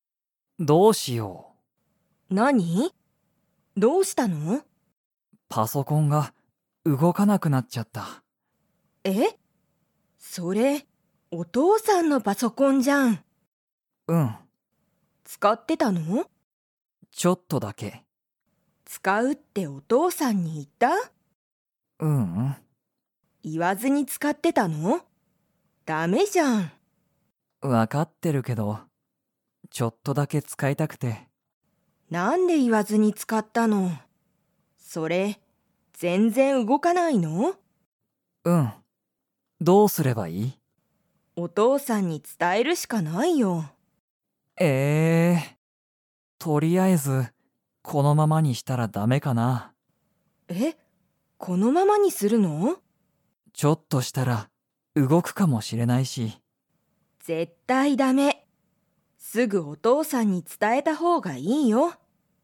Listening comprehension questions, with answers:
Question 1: パソコンは、誰(だれ)のものですか?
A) カオリ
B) タケシ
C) お母(かあ)さん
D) お父(とう)さん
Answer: お父(とう)さん

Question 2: タケシは、お父(とう)さんにパソコンが動(うご)かないことを 。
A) 伝(つた)える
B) 伝(つた)えない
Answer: 伝(つた)える

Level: Level 3

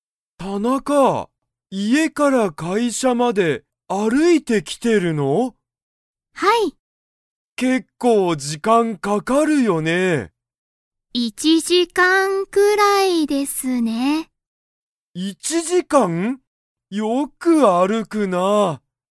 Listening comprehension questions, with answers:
田中(たなか)さんは、家(いえ)から会社(かいしゃ)まで____くらいかかる。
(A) 1時間(じかん)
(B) 1日(にち)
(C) 1週間(しゅうかん)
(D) 1分(ぷん))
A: 1時間(じかん)

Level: Level 1

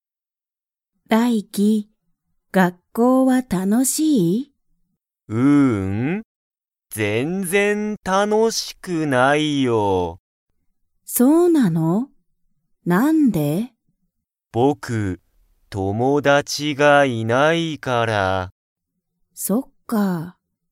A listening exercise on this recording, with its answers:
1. ダイキは____がいない。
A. 英語(えいご)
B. 学校(がっこう)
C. 友達(ともだち)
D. 先生(せんせい)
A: 友達(ともだち)

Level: Level 1

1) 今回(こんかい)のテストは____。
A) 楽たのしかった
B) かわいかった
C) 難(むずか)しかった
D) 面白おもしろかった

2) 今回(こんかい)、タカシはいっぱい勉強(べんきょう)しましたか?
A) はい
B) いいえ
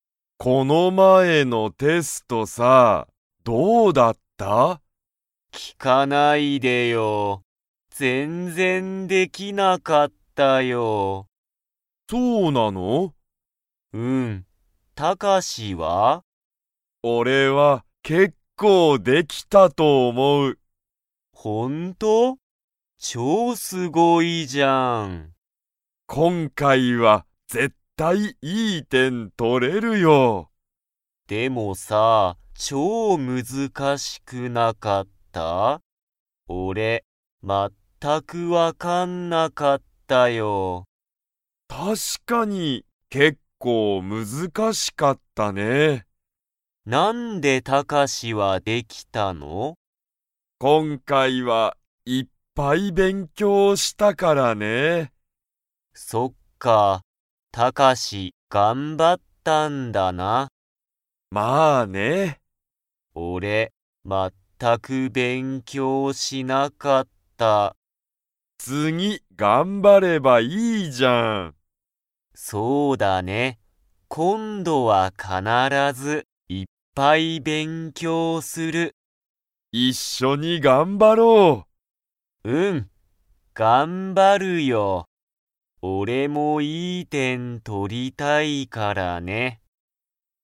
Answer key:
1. 難(むずか)しかった
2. はい

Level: Level 2

